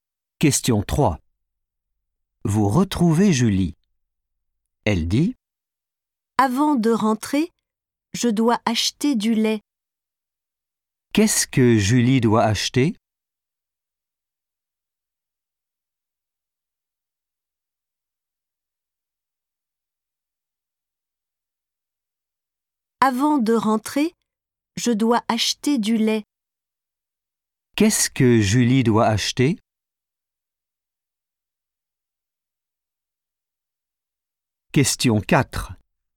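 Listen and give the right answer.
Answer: du lait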